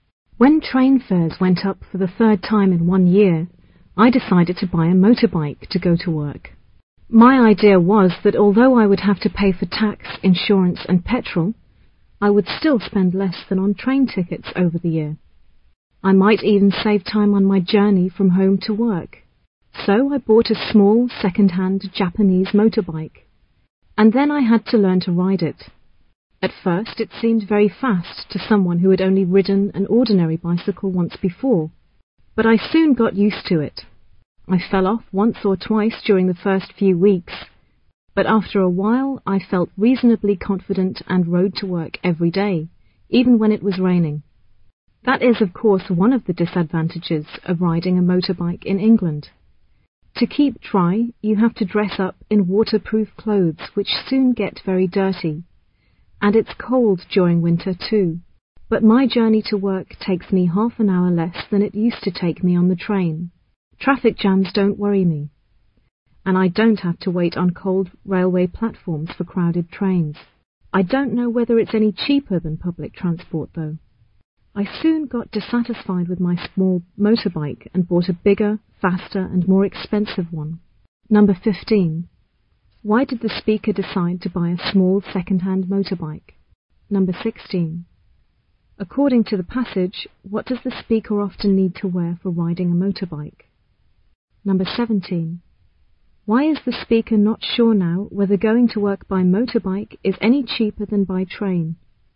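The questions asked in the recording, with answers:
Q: Why did the speaker decide to buy a small second-hand motorbike?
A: Train fares went up again, so he thought it would be cheaper

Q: According to the passage, what does the speaker often need to wear for riding a motorbike?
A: Waterproof clothes

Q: Why is the speaker not sure now whether going to work by motorbike is any cheaper than by train?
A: He bought a bigger, faster, more expensive motorbike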